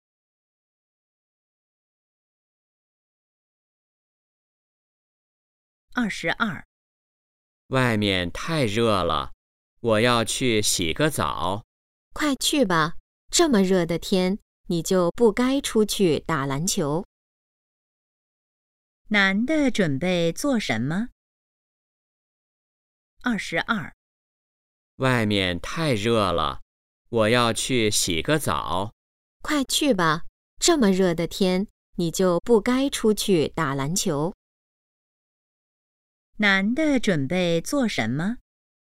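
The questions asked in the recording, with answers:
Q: 男的准备做什么?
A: 洗澡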